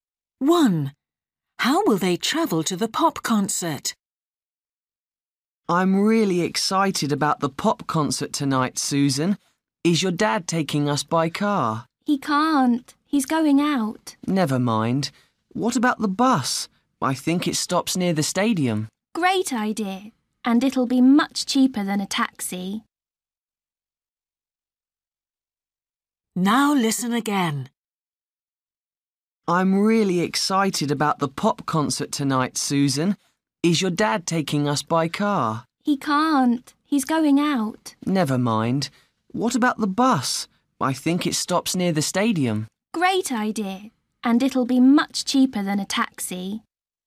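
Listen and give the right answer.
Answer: by bus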